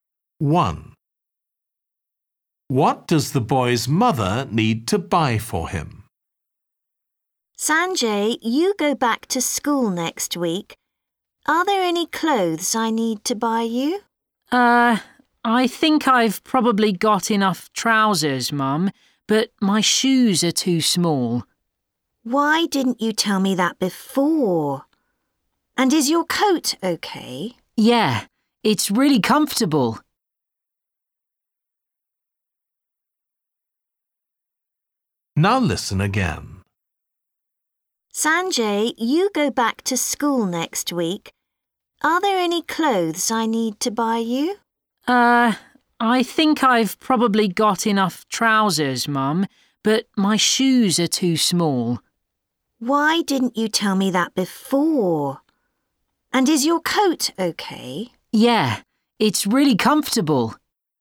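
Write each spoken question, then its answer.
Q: What does the boy's mother need to buy for him?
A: shoes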